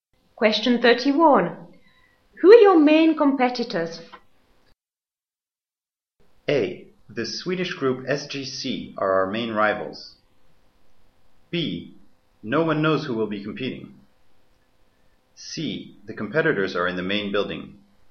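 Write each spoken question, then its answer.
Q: Who are your main competitors?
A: A: The Swedish group SGC are our main rivals.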